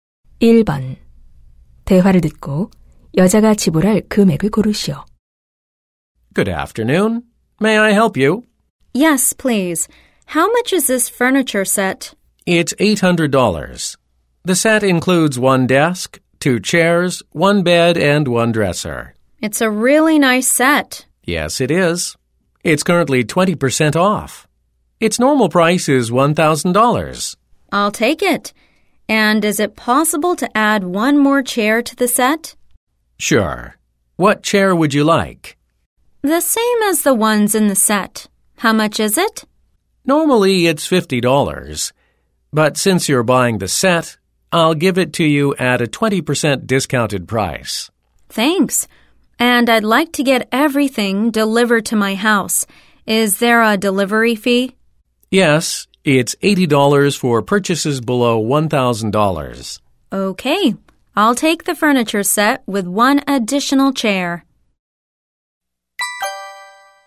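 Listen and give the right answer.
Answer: $920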